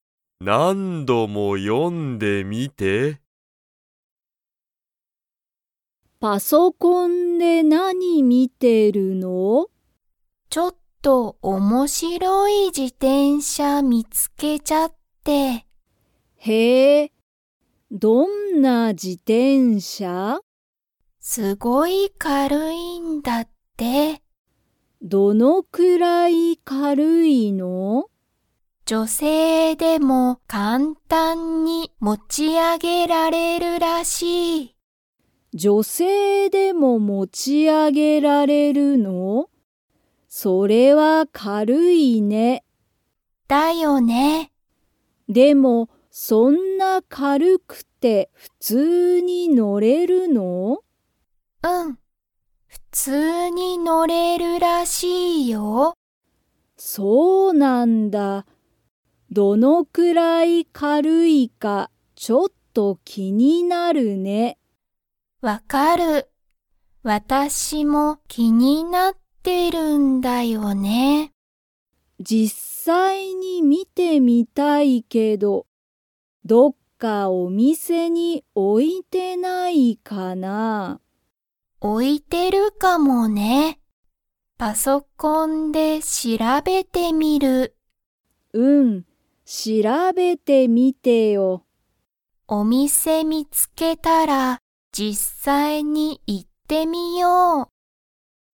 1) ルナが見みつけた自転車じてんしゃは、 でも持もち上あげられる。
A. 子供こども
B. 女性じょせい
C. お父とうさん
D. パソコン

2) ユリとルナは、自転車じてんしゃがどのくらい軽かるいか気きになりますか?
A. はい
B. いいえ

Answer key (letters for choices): 1B, 2A

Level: Level 3